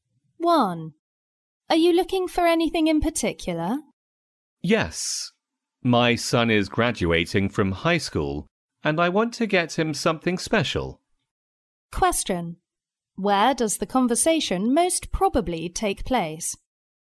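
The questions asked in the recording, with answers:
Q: Where does the conversation most probably take place?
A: In a store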